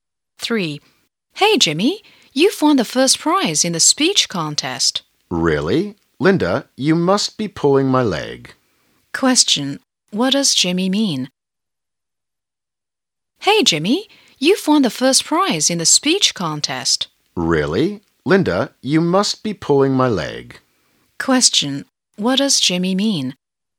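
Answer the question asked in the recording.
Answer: He can't believe it; he thinks Linda is joking.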